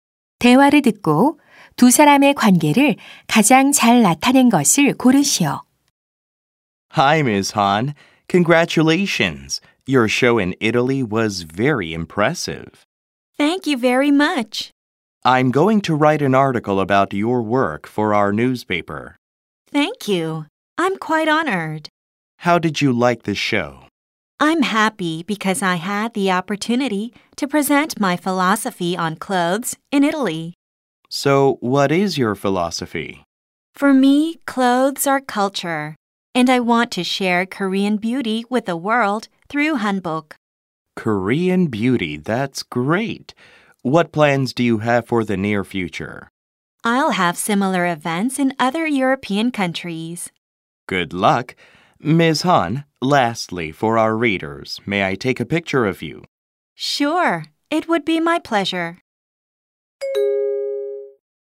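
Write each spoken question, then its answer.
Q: 대화를 듣고 두 사람의 관계를 가장 잘 나타낸 것을 고르시오.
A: 신문 기자 - 한복 디자이너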